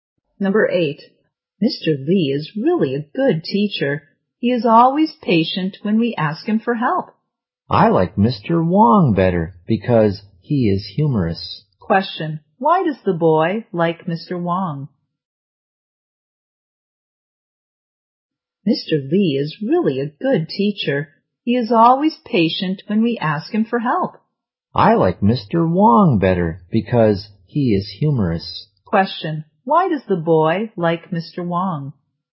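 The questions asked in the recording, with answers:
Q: why does the boy like Mr.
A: Because he is humorous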